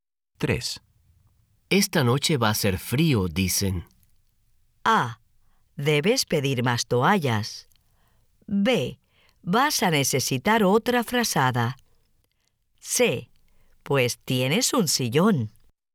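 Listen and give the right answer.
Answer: B: Vas a necesitar otra frazada.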